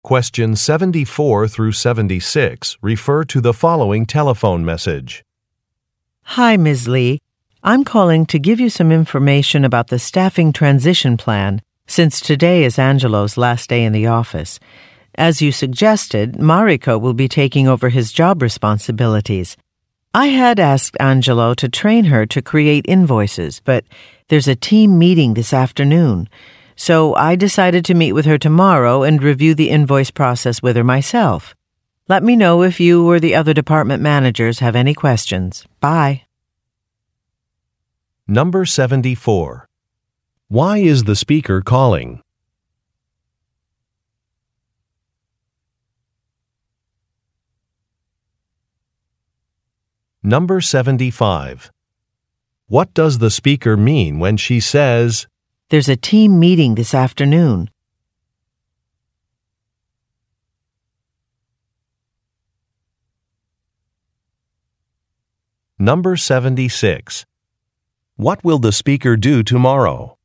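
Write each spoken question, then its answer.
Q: Why is the speaker calling?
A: To give information about the staffing transition plan

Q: What does the speaker mean when she says, "There's a team meeting this afternoon"?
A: Angelo won't have time to train Mariko

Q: What will the speaker do tomorrow?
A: Meet with Mariko to review the invoice process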